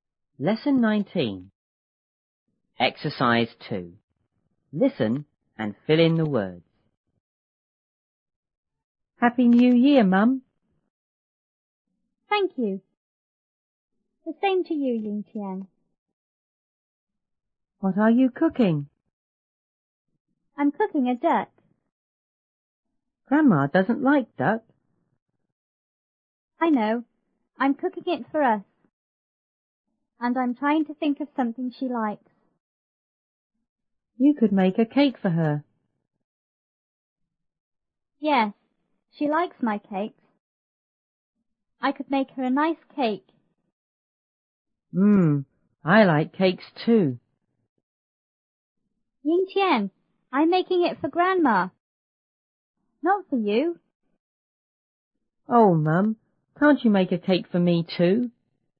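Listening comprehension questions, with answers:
2.Listen and fill in the words.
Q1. Yingtian:____ ____ ____ ,Mum.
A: Happy New Year

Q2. The ____ to you,Yingtian.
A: same

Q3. Yingtian:What ___ you ___ ?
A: are, cooking

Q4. Mrs Ma:I'm cooking a ___.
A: duck

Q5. Yingtian:Grandma ___ ___ ___.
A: doesn't like duck

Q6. And I'm___to think of something she___.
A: trying, likes

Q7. Yingtian:You ___ ___ a cake for her.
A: could make

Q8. Mrs Ma:Yes,she ___ my cakes.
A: likes

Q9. I ___ make her a nice cake.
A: could

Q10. Yingtian:Mmm!I ___ cakes,too.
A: like

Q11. Yingtian,I'm making it for Grandma,___ ___ you!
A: not for

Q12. Oh,Mum,___ ___make a cake for me,too?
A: can't you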